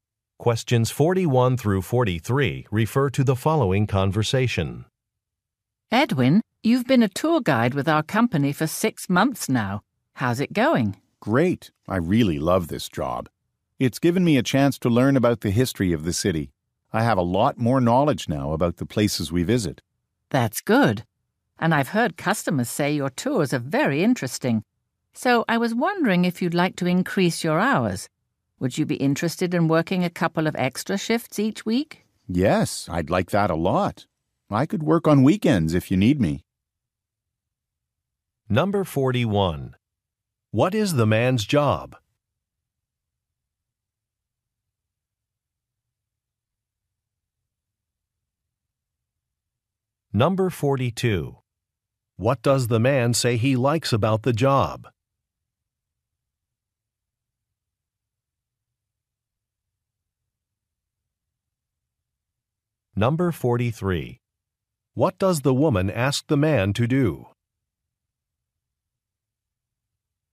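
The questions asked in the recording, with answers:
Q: What is the man's job?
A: Tour guide

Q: What does the man say he likes about the job?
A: Learning about the city's history

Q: What does the woman ask the man to do?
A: Work extra shifts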